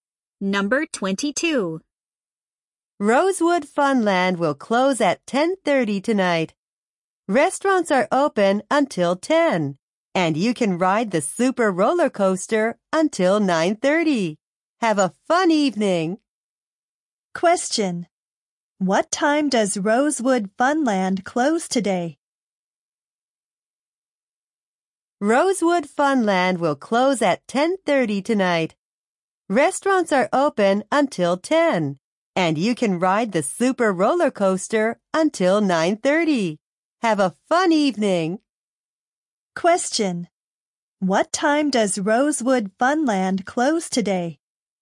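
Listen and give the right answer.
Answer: At 10:30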